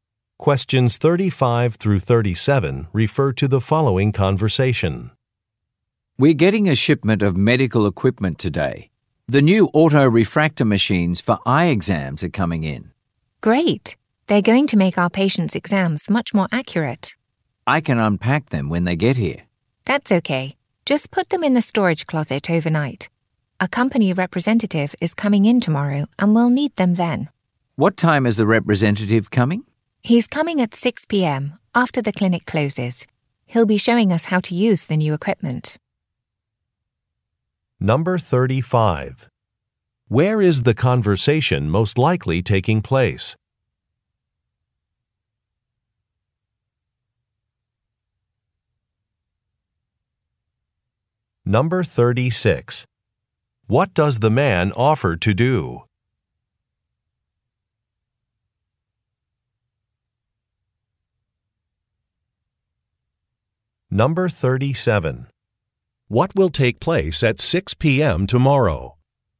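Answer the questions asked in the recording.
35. At an eye clinic
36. Unpack the equipment
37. A demonstration of the new equipment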